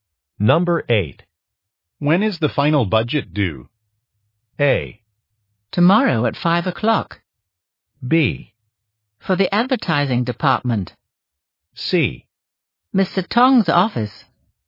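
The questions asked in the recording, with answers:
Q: When is the final budget due?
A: A: Tomorrow at 5 o'clock.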